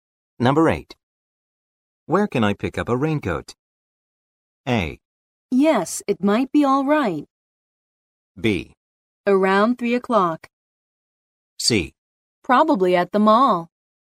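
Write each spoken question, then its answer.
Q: Where can I pick up a raincoat?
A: C: Probably at the mall.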